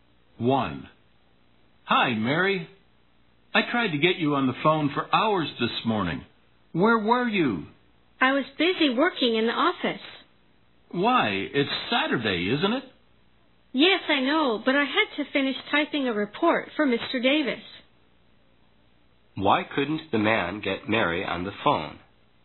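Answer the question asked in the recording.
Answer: She was busy working in the office, finishing typing a report for Mr. Davis.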